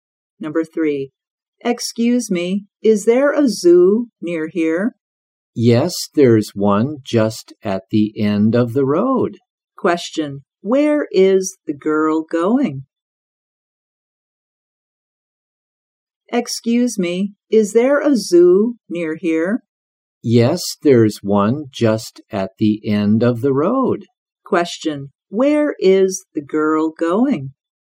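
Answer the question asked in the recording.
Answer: To the zoo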